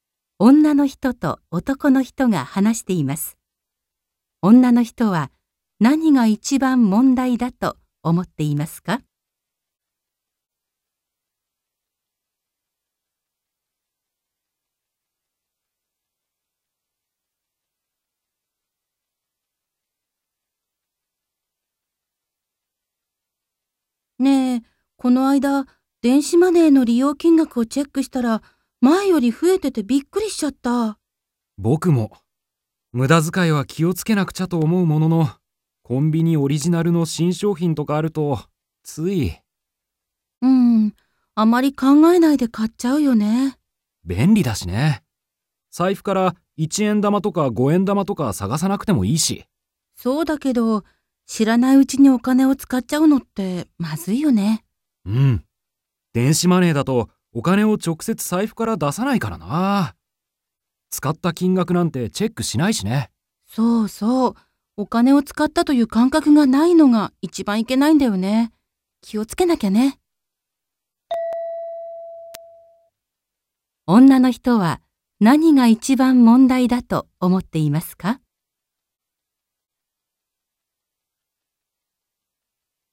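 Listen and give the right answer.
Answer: お金を使ったという感覚がないこと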